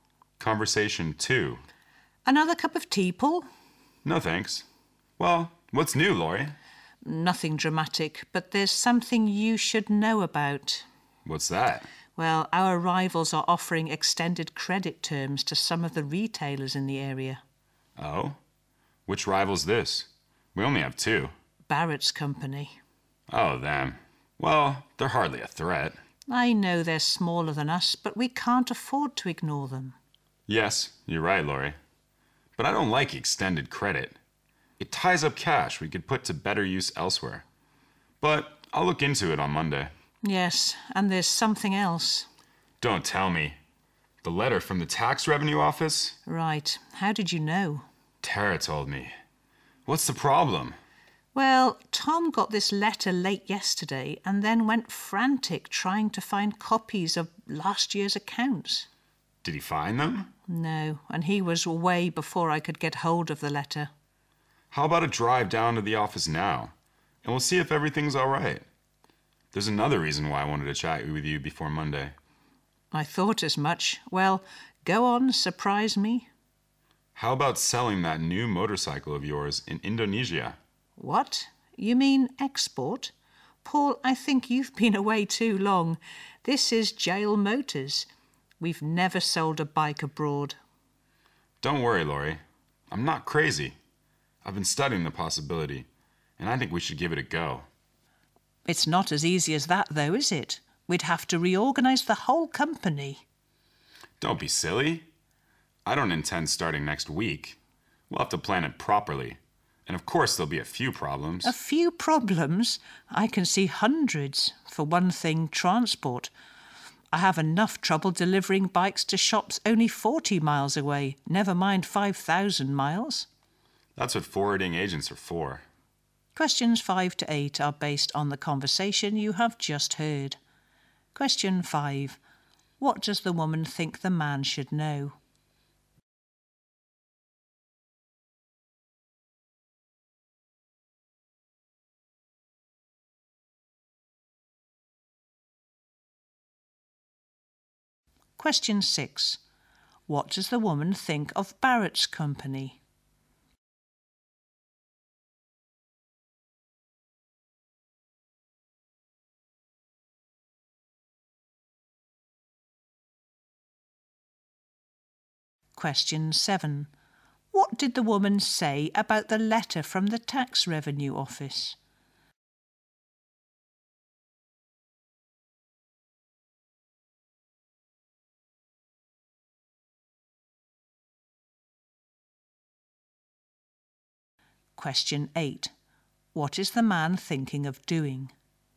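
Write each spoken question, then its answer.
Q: What does the woman think the man should know?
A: Their rival is offering extended credit terms to retailers

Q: What does the woman think of Barrett's company?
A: It is smaller, but they can't afford to ignore it

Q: What did the woman say about the letter from the tax revenue office?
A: Tom got it late yesterday and couldn't find copies of last year's accounts

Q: What is the man thinking of doing?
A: Selling their new motorcycle in Indonesia (exporting)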